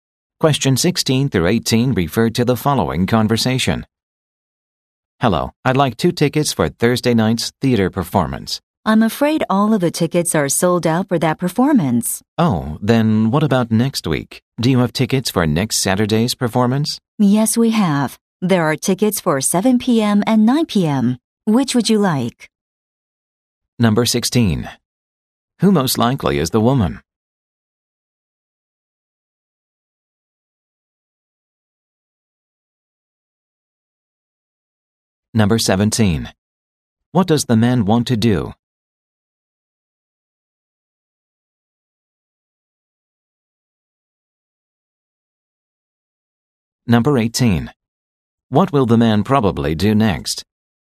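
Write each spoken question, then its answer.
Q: Who most likely is the woman?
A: A theater ticket seller

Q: What does the man want to do?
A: Buy two theater tickets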